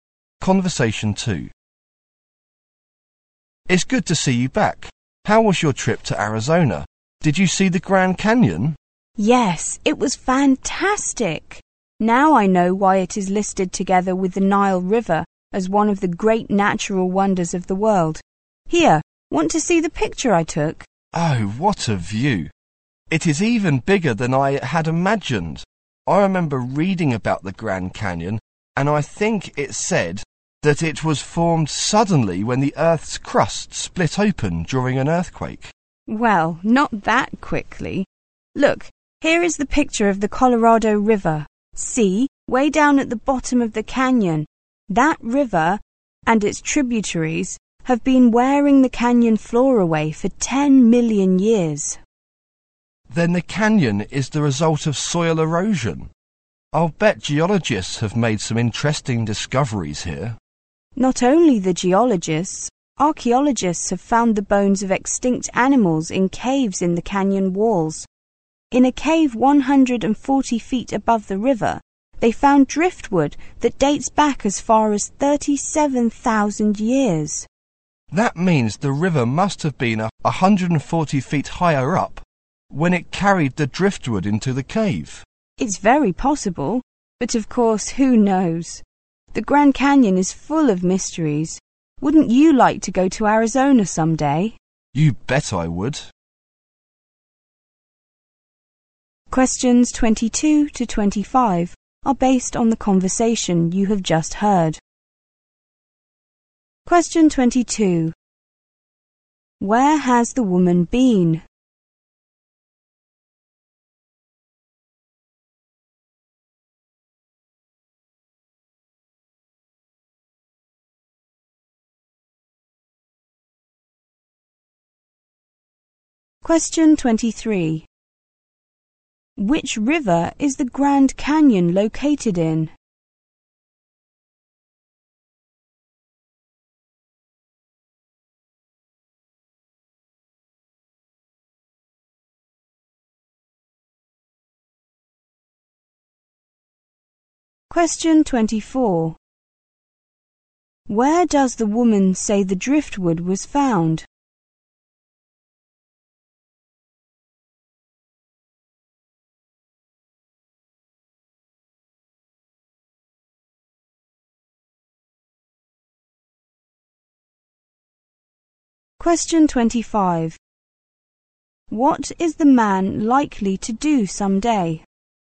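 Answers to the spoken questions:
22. Arizona, at the Grand Canyon.
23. The Colorado River.
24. In a cave 140 feet above the river.
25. Go to Arizona.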